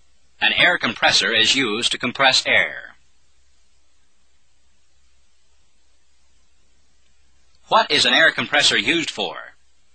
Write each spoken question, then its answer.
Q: What is an air compressor used for?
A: To compress air. An air compressor is used to compress air.